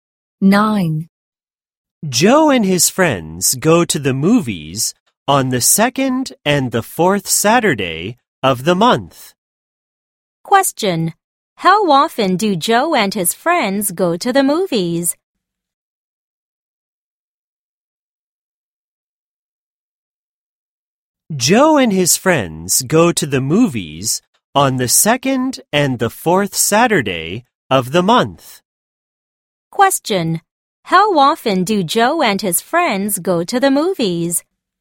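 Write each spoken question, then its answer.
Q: How often do Joe and his friends go to the movies?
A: Twice a month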